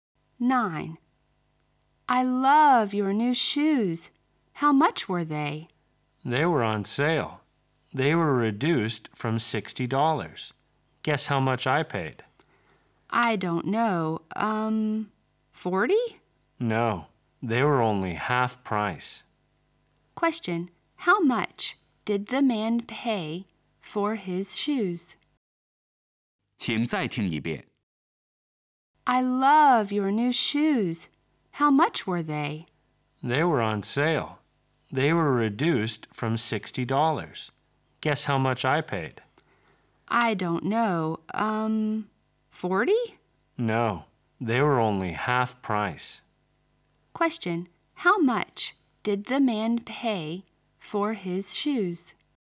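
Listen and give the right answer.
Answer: $30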